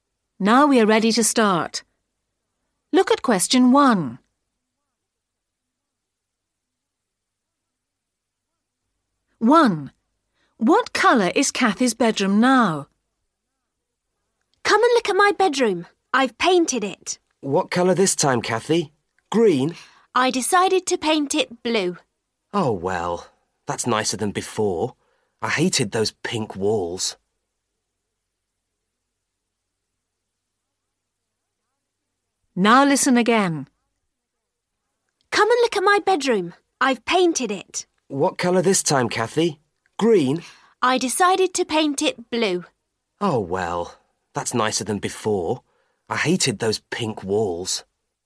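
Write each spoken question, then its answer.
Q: What colour is Kathy's bedroom now?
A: Blue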